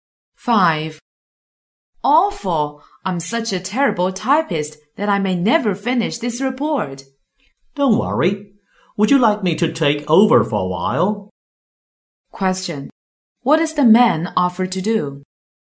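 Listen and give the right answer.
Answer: Type the report for the woman for a while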